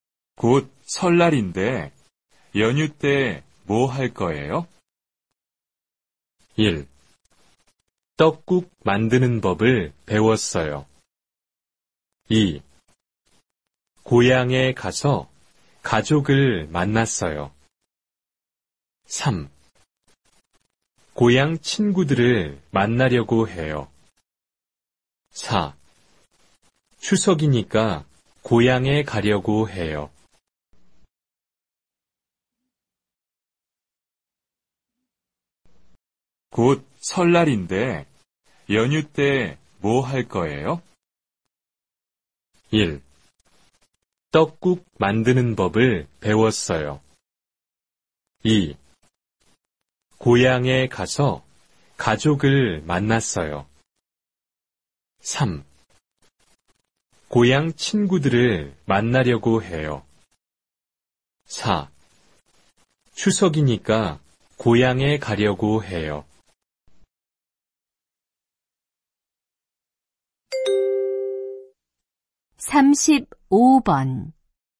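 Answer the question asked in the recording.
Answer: 3: 고향 친구들을 만나려고 해요.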